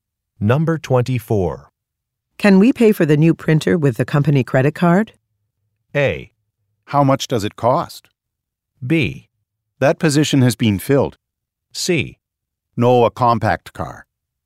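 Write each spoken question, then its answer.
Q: Can we pay for the new printer with the company credit card?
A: A: How much does it cost?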